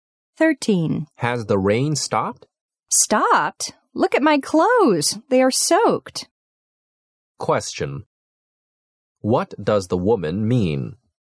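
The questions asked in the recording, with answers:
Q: What does the woman mean?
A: It is still raining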